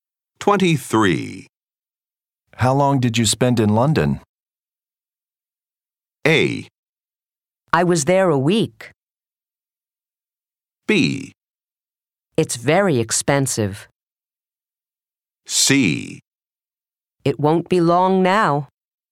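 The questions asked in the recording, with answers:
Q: How long did you spend in London?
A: A: I was there a week.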